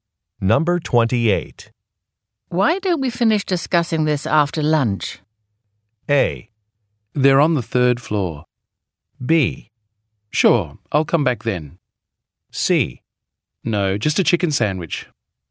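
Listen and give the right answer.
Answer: B: Sure, I'll come back then.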